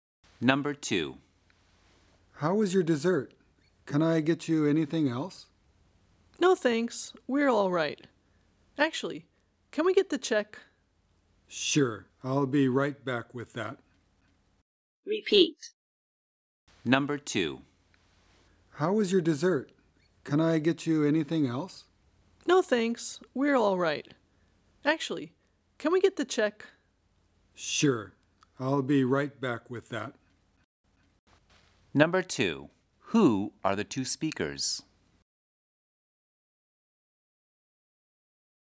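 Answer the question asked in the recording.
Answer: A waiter and a customer at a restaurant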